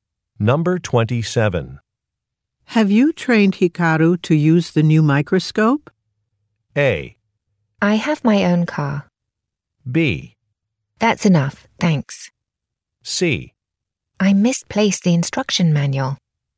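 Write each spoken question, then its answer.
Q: Have you trained Hikaru to use the new microscope?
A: C: I misplaced the instruction manual.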